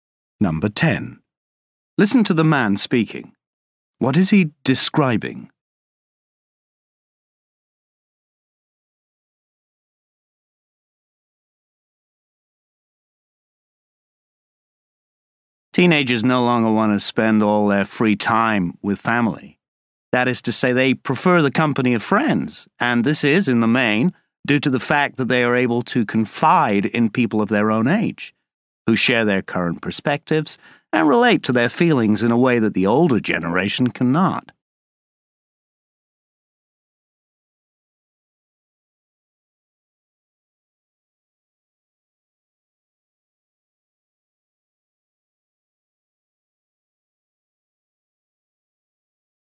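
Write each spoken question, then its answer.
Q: What is he describing?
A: Why teenagers prefer spending time with friends rather than family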